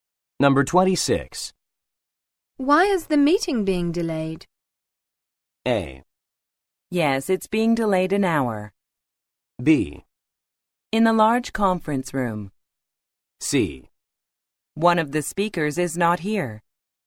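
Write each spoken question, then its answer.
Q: Why is the meeting being delayed?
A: C: One of the speakers is not here.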